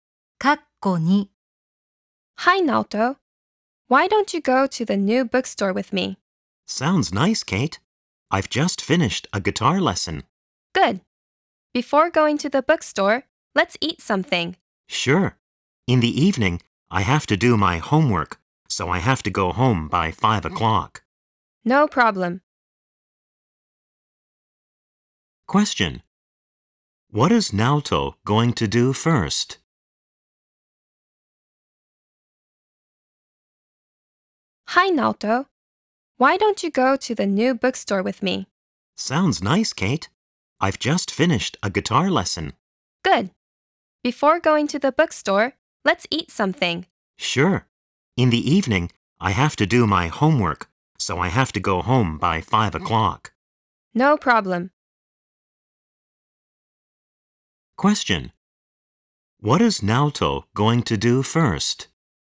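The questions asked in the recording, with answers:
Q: What is Naoto going to do first?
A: He is going to eat something with Kate.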